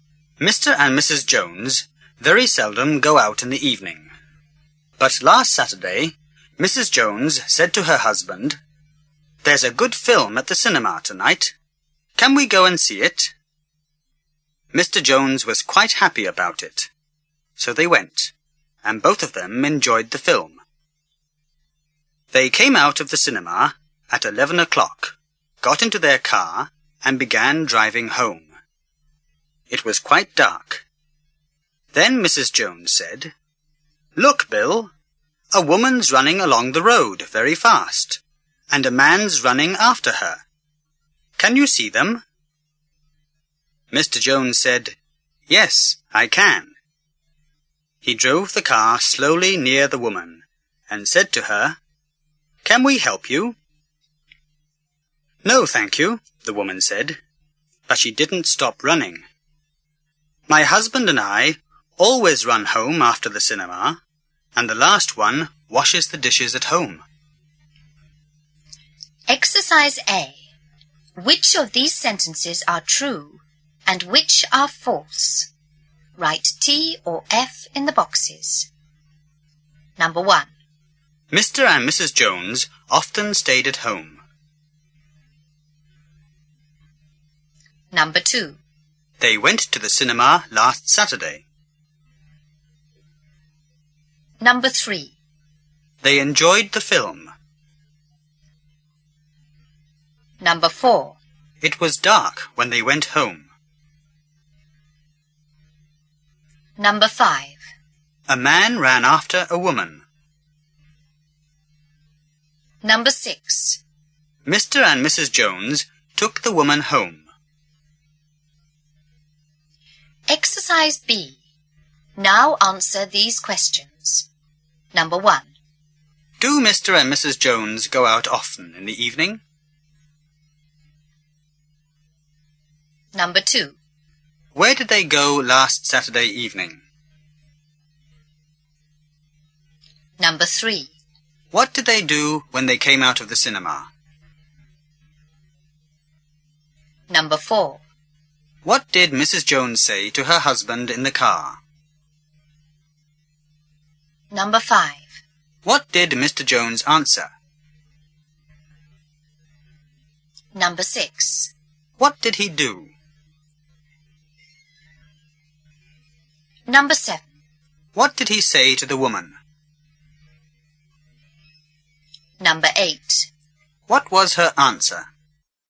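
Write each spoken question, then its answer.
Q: Mr. and Mrs. Jones often stayed at home.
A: True

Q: They went to the cinema last Saturday.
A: True

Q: They enjoyed the film.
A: True

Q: It was dark when they went home.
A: True

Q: A man ran after a woman.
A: True

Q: Mr. and Mrs. Jones took the woman home.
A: False

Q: Do Mr. and Mrs. Jones go out often in the evening?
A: No, they very seldom go out in the evening.

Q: Where did they go last Saturday evening?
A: To the cinema.

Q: What did they do when they came out of the cinema?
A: They got into their car and began driving home.

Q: What did Mrs. Jones say to her husband in the car?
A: Look, Bill, a woman's running along the road very fast, and a man's running after her. Can you see them?

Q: What did Mr. Jones answer?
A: Yes, I can.

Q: What did he do?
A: He drove the car slowly near the woman.

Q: What did he say to the woman?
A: Can we help you?

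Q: What was her answer?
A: No, thank you. My husband and I always run home after the cinema, and the last one washes the dishes.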